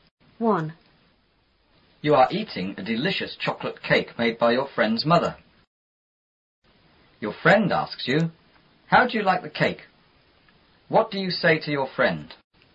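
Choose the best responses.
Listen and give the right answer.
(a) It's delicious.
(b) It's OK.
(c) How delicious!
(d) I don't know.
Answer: (a) It's delicious.

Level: 初中英语广州版4B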